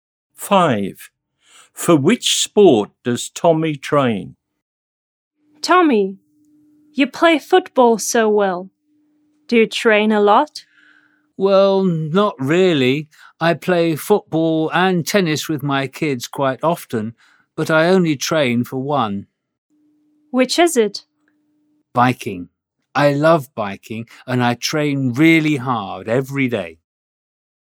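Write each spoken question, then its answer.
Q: For which sport does Tommy train?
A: Biking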